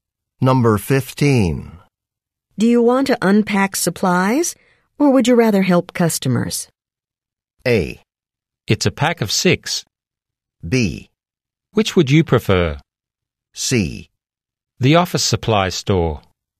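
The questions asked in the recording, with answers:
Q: Do you want to unpack supplies, or would you rather help customers?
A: B: Which would you prefer?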